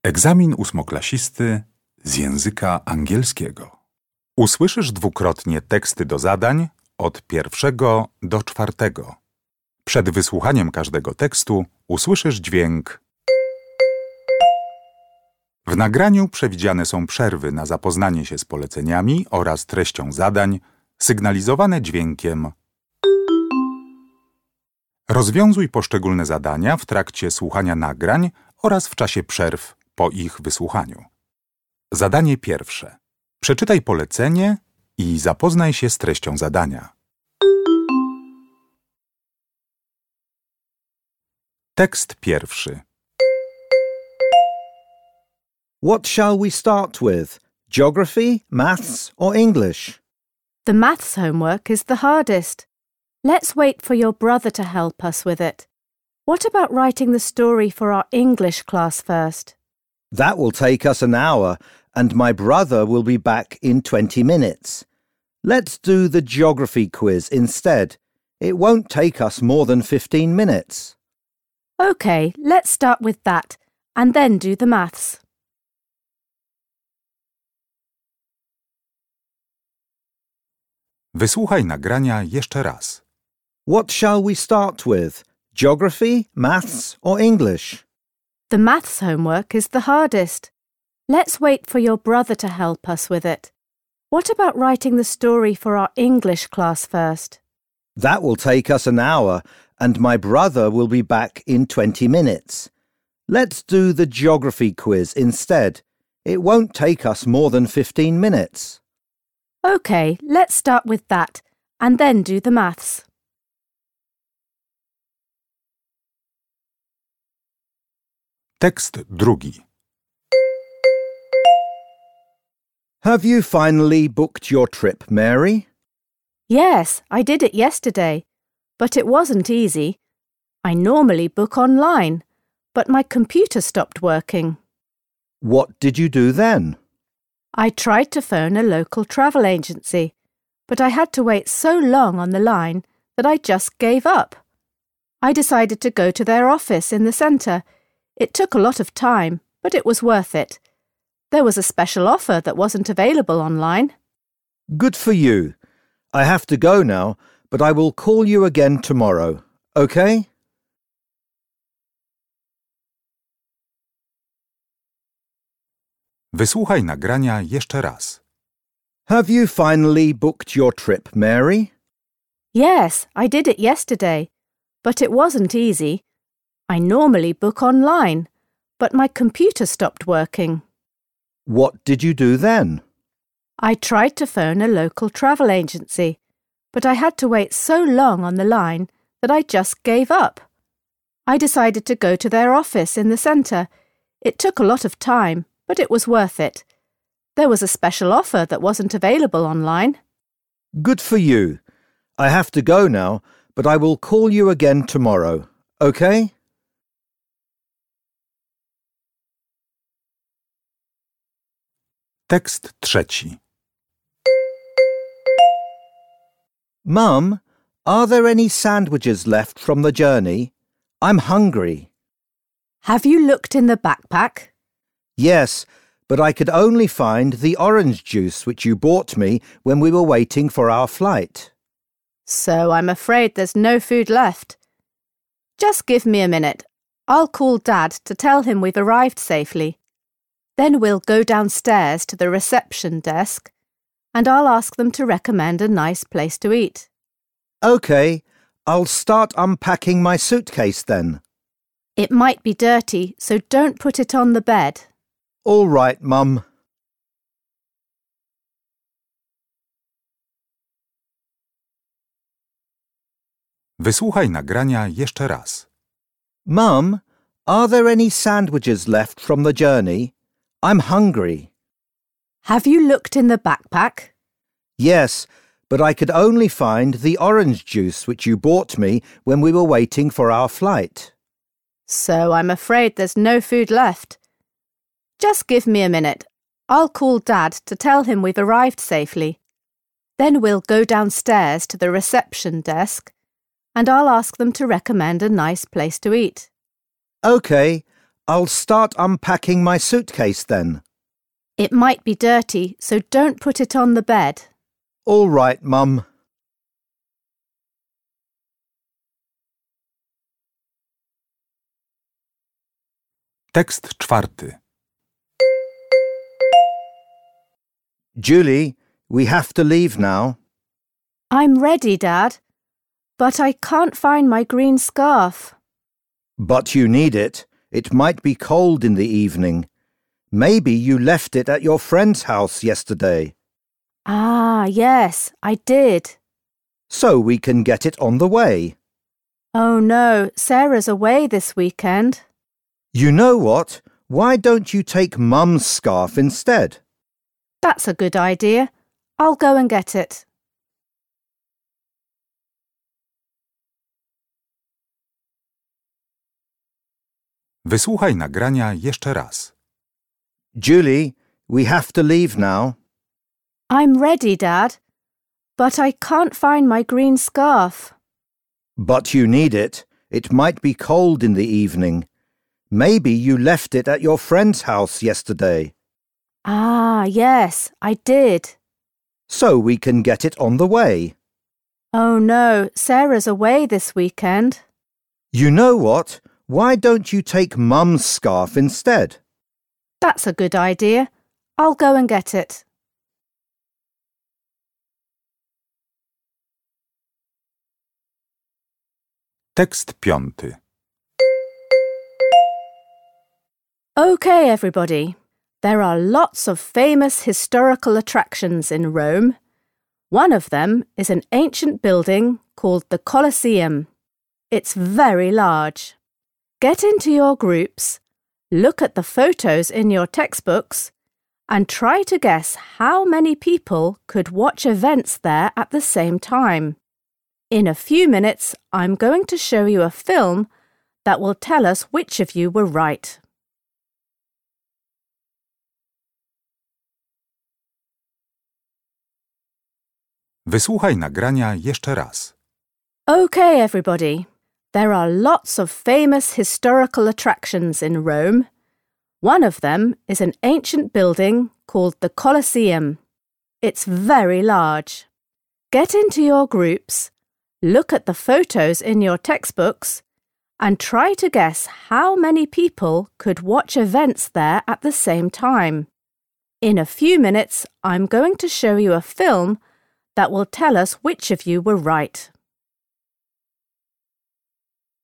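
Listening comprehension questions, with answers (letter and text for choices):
Uruchamiając odtwarzacz z oryginalnym nagraniem CKE usłyszysz dwukrotnie pięć tekstów. W zadaniach 1.1.–1.5., na podstawie informacji zawartych w nagraniu, z podanych odpowiedzi wybierz właściwą.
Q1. In the conversation, Dad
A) asks Julie to lend him something.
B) suggests a solution to Julie's problem.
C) gives an opinion about Julie's friend.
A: B) suggests a solution to Julie's problem.

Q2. The teacher is talking about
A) a classroom task.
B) a school trip.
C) a historical event.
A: A) a classroom task.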